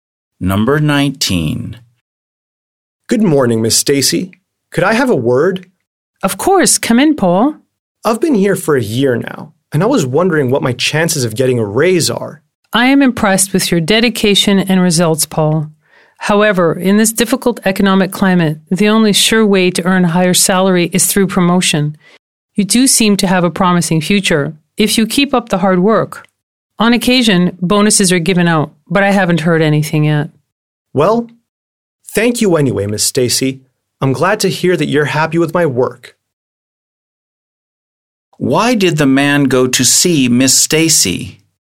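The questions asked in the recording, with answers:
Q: Why did the man go to see Miss Stacy?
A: To ask about getting a raise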